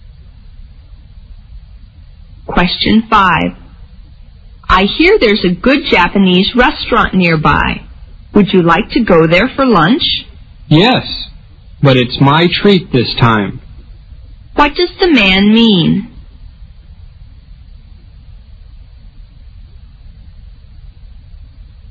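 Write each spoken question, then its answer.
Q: What does the man mean?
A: He will pay for lunch this time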